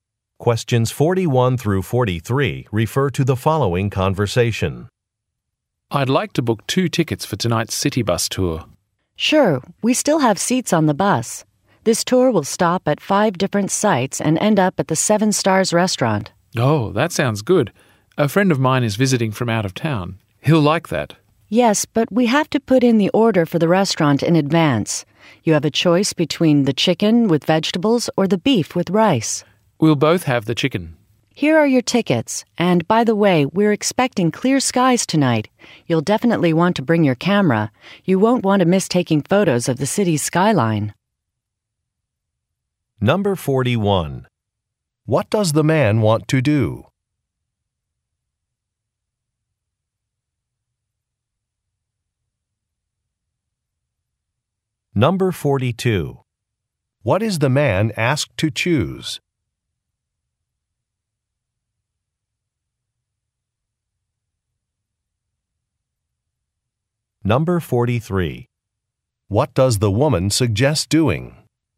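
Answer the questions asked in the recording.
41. Book two tickets for a city bus tour
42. A meal
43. Bringing a camera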